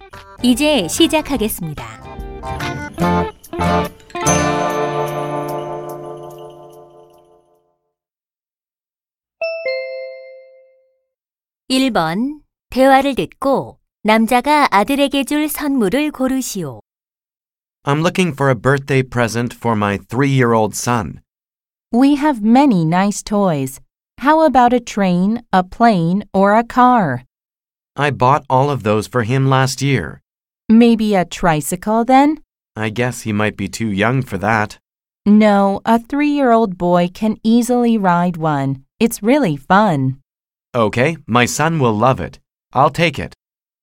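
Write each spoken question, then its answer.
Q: 대화를 듣고 남자가 아들에게 줄 선물을 고르시오.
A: 세발자전거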